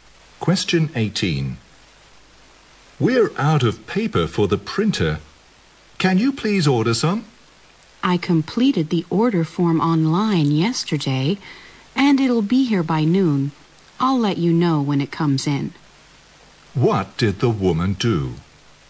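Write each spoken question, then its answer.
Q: What did the woman do?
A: She ordered printer paper online yesterday.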